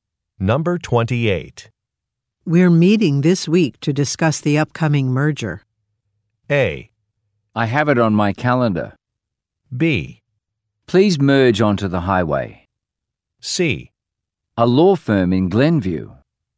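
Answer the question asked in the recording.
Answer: A: I have it on my calendar.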